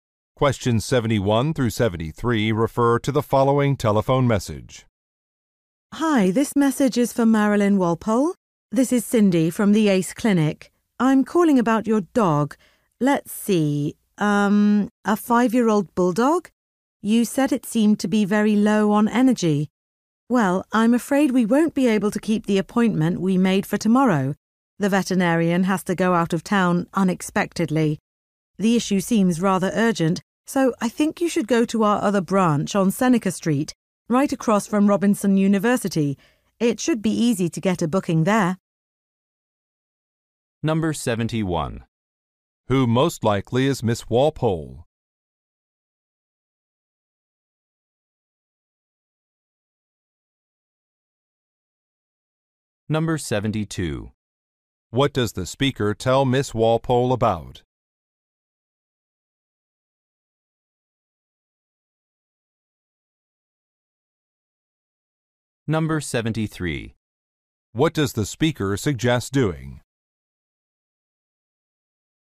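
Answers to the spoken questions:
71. A dog owner (a clinic patient's owner)
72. A canceled appointment
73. Going to another branch on Seneca Street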